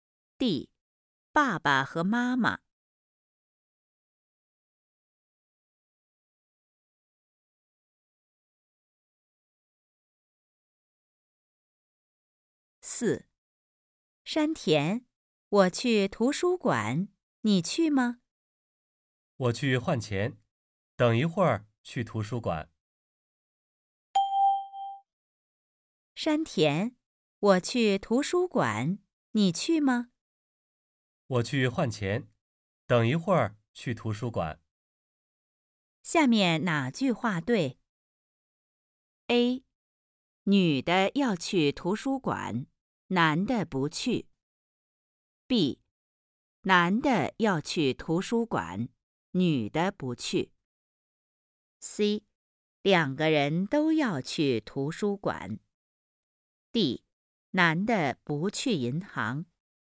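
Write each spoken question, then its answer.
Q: 下面哪句话对?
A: C: 两个人都要去图书馆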